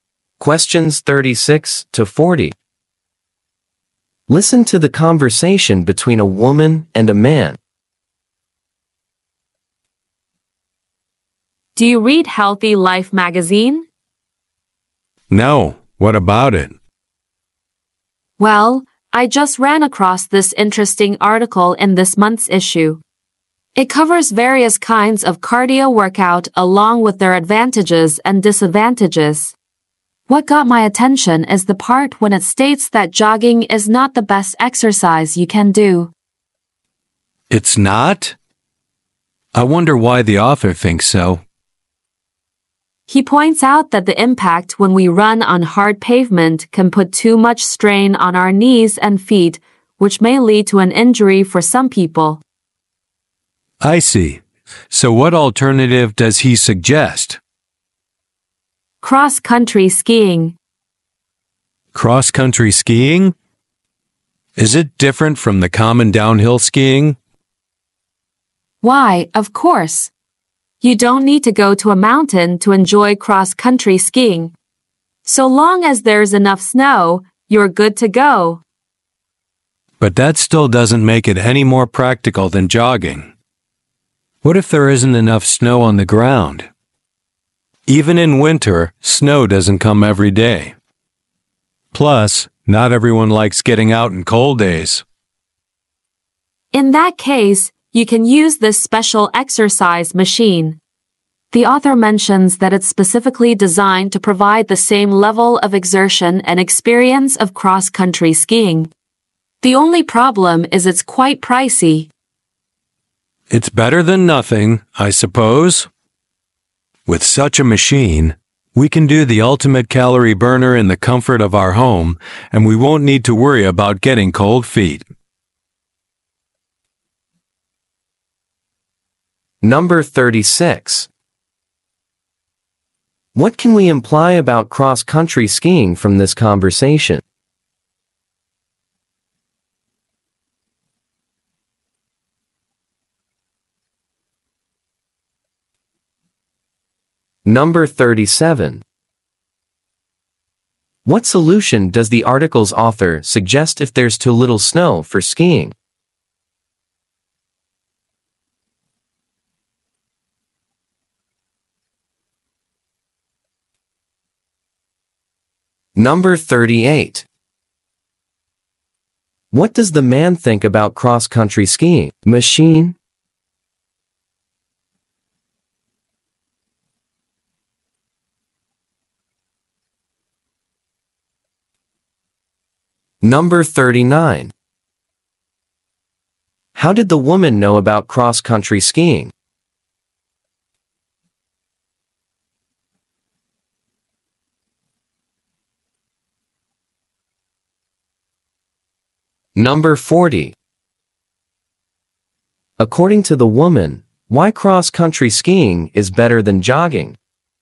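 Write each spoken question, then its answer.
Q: What solution does the article's author suggest if there's too little snow for skiing?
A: Use a special exercise machine

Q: How did the woman know about cross-country skiing?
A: From an article in Healthy Life magazine

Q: According to the woman, why cross-country skiing is better than jogging?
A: It puts less strain on the knees and feet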